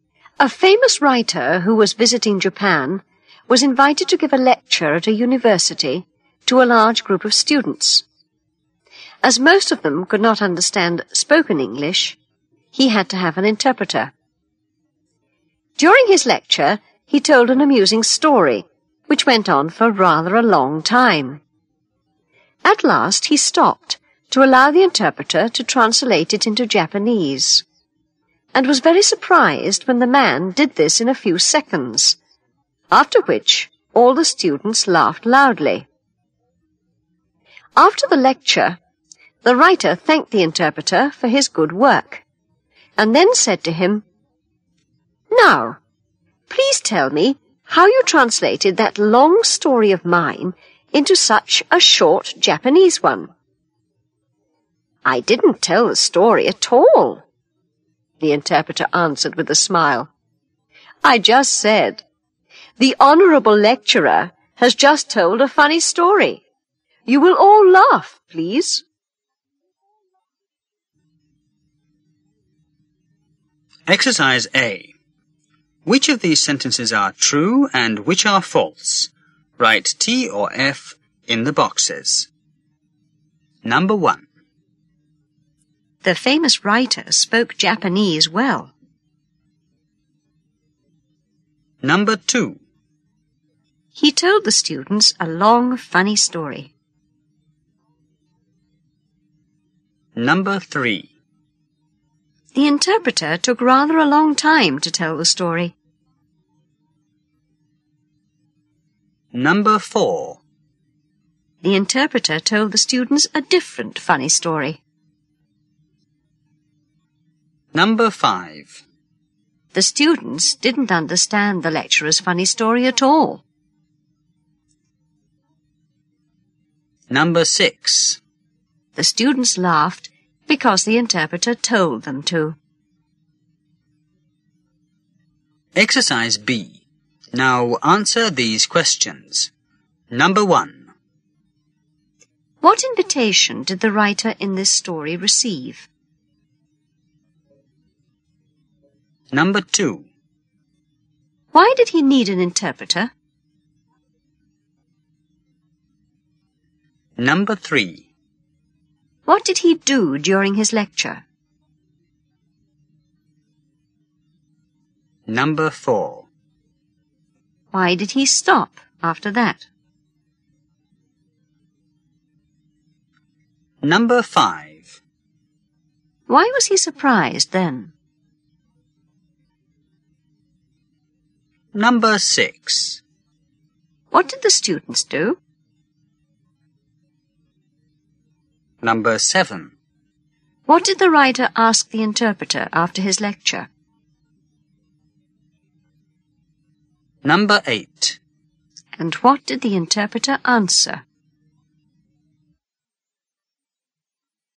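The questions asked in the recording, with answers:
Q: The famous writer spoke Japanese well.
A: False

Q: He told the students a long, funny story.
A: True

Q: The interpreter took rather a long time to tell the story.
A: False

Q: The interpreter told the students a different funny story.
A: False

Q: The students didn't understand the lecturer's funny story at all.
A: True

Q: The students laughed because the interpreter told them to.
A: True

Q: What invitation did the writer in this story receive?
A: To give a lecture at a university to a large group of students

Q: Why did he need an interpreter?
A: Most of the students could not understand spoken English

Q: What did he do during his lecture?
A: He told a long, amusing story

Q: Why did he stop after that?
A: To allow the interpreter to translate it into Japanese

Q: Why was he surprised then?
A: The interpreter translated it in a few seconds

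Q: What did the students do?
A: They all laughed loudly

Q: What did the writer ask the interpreter after his lecture?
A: How he translated the long story into such a short Japanese one

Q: And what did the interpreter answer?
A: He didn't tell the story; he just told the students the lecturer had told a funny story and asked them to laugh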